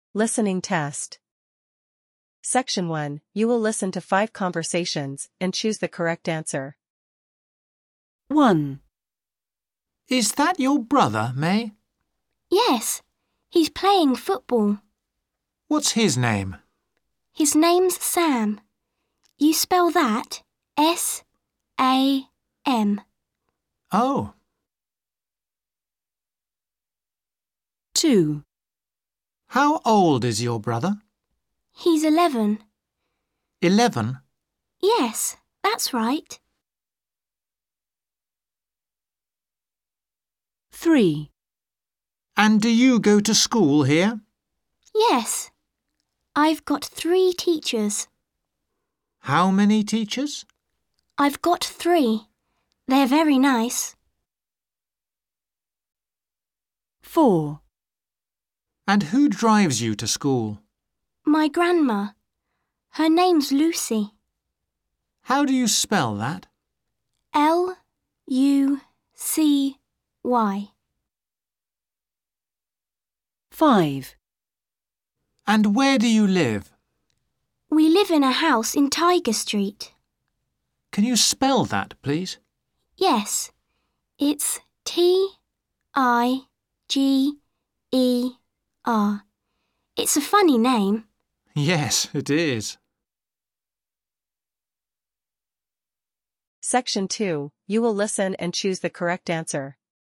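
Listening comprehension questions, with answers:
You will listen to 5 conversations and choose the correct answer.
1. What is May's brother's name?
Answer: Sam

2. How old is May's brother?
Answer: 11

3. How many teachers does May have?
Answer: 3

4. What is May's grandma's name?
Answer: Lucy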